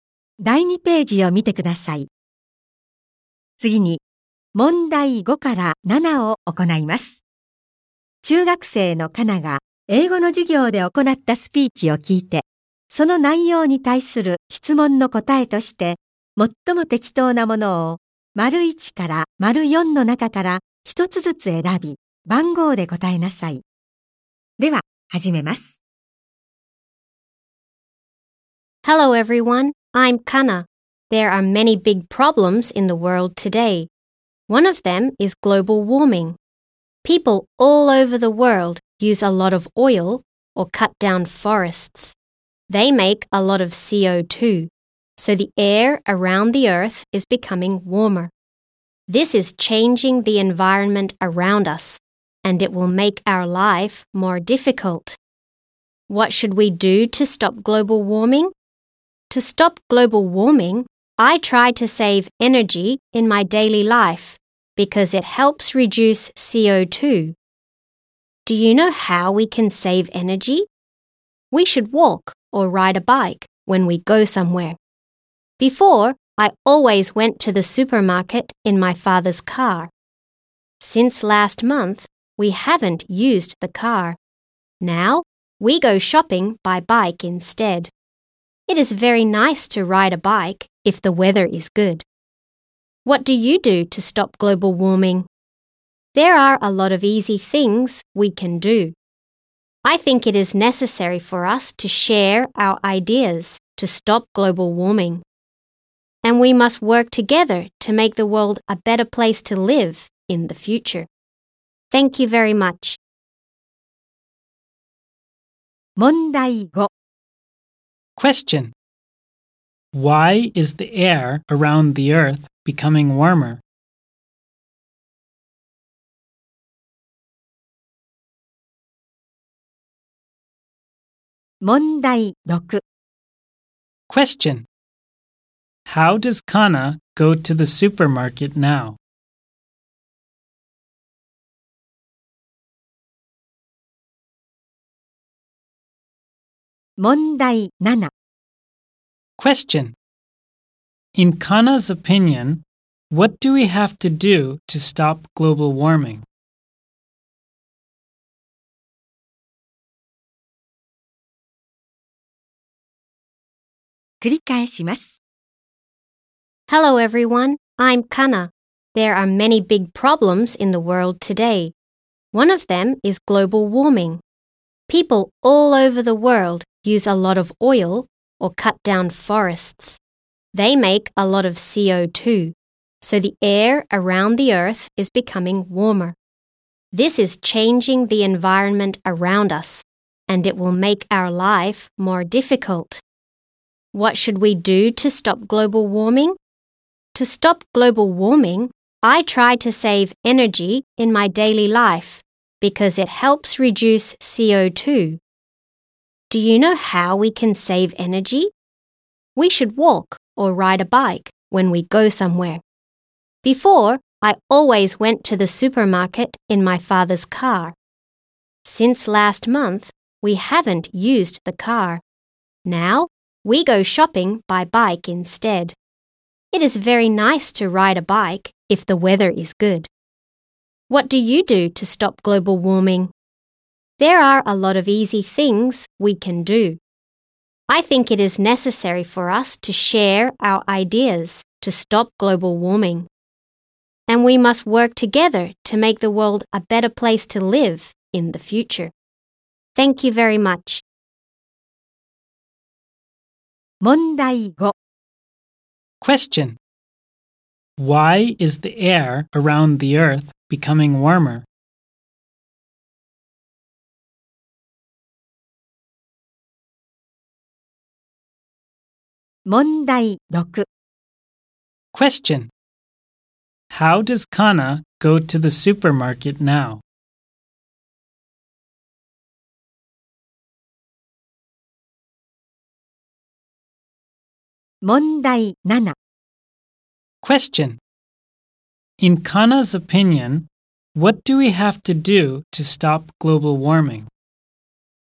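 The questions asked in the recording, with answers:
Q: Why is the air around the earth becoming warmer?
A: People use a lot of oil or cut down forests, making a lot of CO2

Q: How does Kana go to the supermarket now?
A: By bike

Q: In Kana's opinion, what do we have to do to stop global warming?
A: Share our ideas and work together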